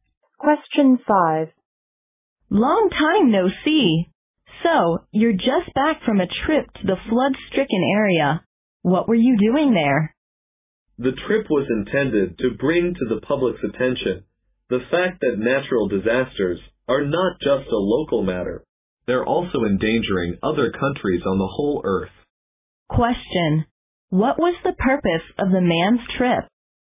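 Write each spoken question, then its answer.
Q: What was the purpose of the man's trip?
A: To make the public aware that natural disasters are not just a local matter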